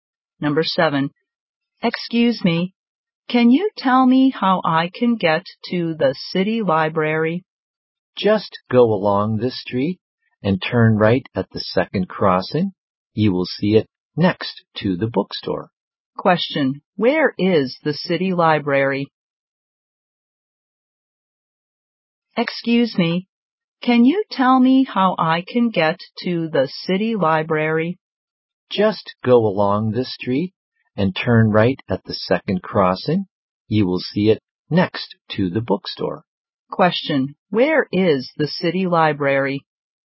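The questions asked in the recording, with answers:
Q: Where is the city library?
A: Next to the bookstore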